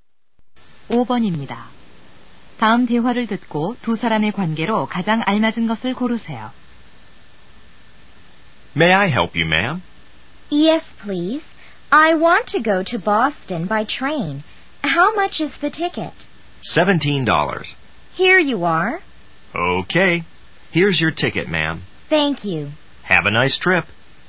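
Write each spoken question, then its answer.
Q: 다음 대화를 듣고 두 사람의 관계로 가장 알맞은 것을 고르세요.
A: 매표원과 승객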